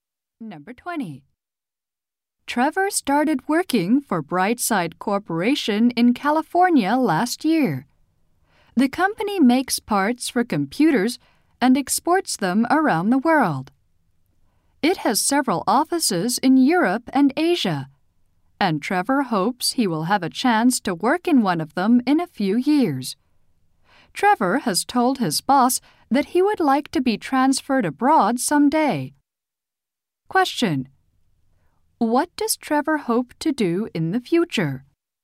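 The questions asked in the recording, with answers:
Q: What does Trevor hope to do in the future?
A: Work in one of the company's offices abroad.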